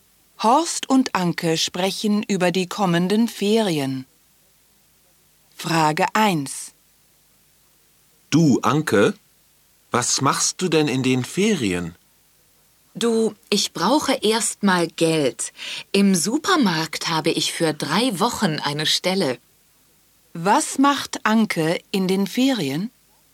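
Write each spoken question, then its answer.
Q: Was macht Anke in den Ferien?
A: Sie arbeitet drei Wochen im Supermarkt.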